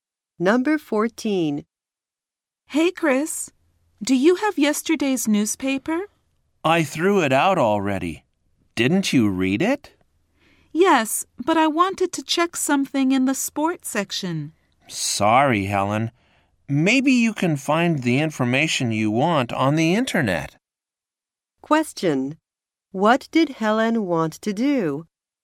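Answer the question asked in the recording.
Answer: Check something in the sports section of yesterday's newspaper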